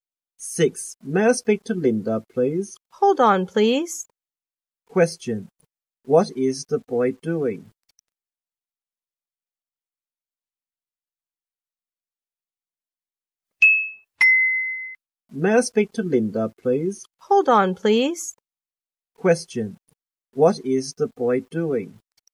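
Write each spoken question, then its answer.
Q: What is the boy doing?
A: Making a phone call to Linda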